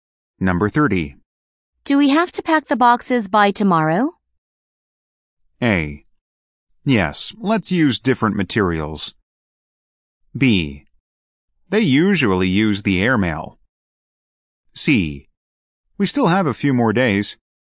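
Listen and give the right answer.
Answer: C: We still have a few more days.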